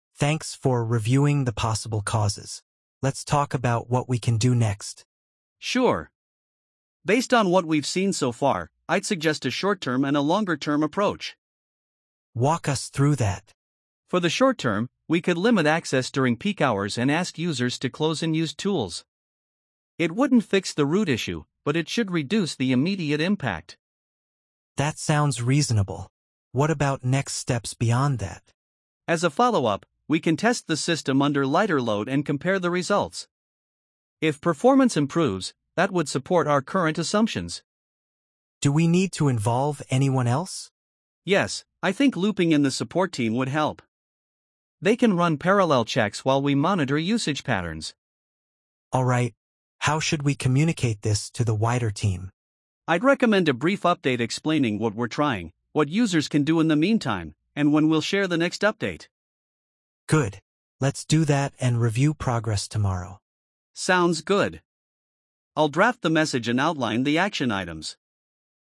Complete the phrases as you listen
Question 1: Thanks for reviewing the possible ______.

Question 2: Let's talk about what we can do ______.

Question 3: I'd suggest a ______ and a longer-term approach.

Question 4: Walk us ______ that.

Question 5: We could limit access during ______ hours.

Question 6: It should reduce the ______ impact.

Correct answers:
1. causes
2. next
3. short-term
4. through
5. peak
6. immediate

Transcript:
"Thanks for reviewing the possible causes. Let's talk about what we can do next."
"Sure. Based on what we've seen so far, I'd suggest a short-term and a longer-term approach."
"Walk us through that."
"For the short term, we could limit access during peak hours and ask users to close unused tools. It wouldn't fix the root issue, but it should reduce the immediate impact."
"That sounds reasonable. What about next steps beyond that?"
"As a follow-up, we can test the system under lighter load and compare the results. If performance improves, that would support our current assumptions."
"Do we need to involve anyone else?"
"Yes, I think looping in the support team would help. They can run parallel checks while we monitor usage patterns."
"Alright. How should we communicate this to the wider team?"
"I'd recommend a brief update explaining what we're trying, what users can do in the meantime, and when we'll share the next update."
"Good. Let's do that and review progress tomorrow."
"Sounds good. I'll draft the message and outline the action items."